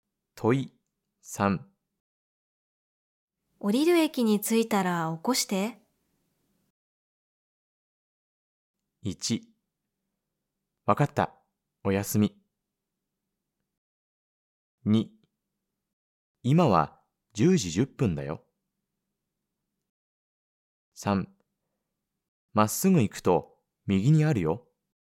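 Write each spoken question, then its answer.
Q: 降りる駅に着いたら起こして。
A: 1: わかった。おやすみ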